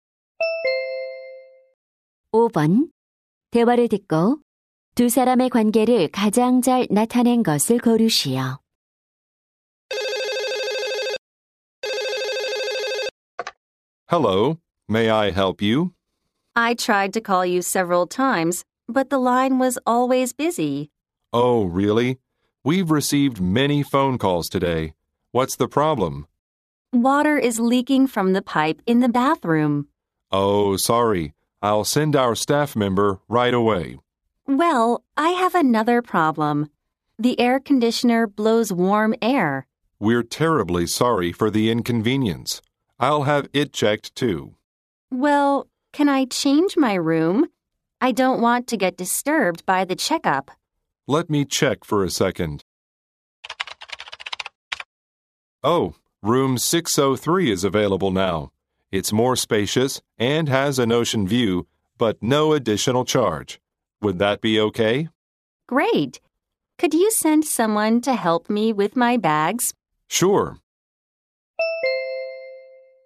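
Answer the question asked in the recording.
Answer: 호텔 직원 - 투숙객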